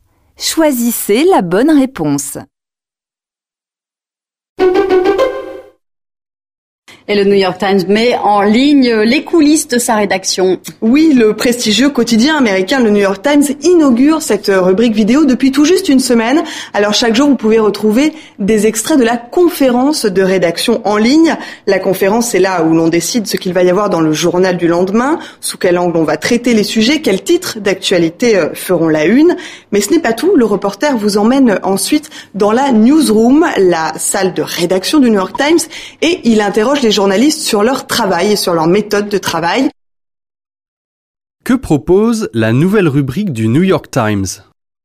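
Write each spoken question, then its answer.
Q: Que propose la nouvelle rubrique du New York Times ?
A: Des vidéos des coulisses de la rédaction : des extraits de la conférence de rédaction et des interviews de journalistes sur leurs méthodes de travail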